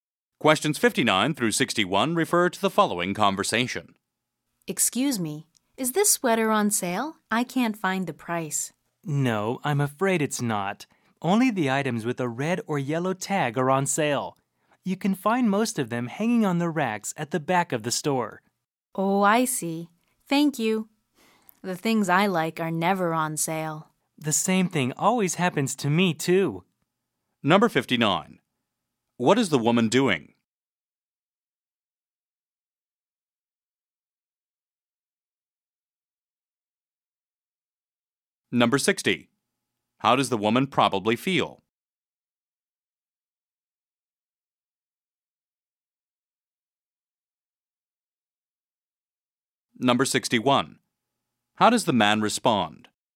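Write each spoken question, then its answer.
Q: What is the woman doing?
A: Shopping; asking whether a sweater is on sale

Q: How does the woman probably feel?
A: Disappointed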